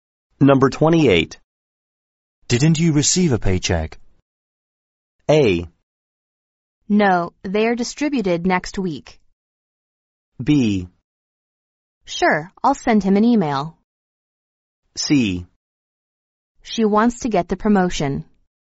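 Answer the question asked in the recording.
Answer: A: No, they are distributed next week.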